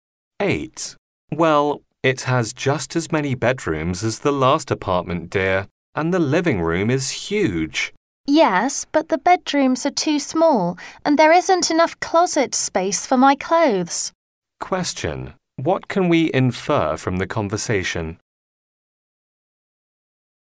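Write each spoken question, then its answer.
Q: What can we infer from the conversation?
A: The woman doesn't like the apartment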